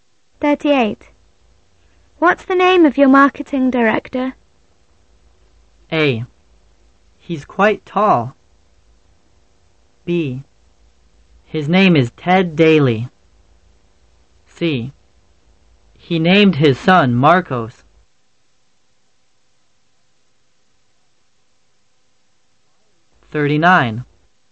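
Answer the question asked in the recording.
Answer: B: His name is Ted Daly.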